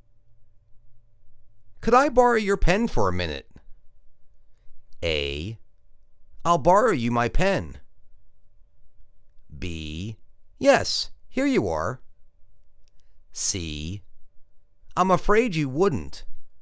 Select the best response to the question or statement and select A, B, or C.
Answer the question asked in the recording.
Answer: Yes, here you are.